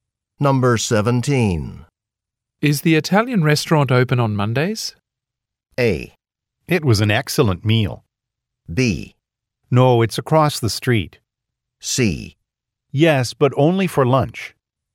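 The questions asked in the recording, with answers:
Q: Is the Italian restaurant open on Mondays?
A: C: Yes, but only for lunch.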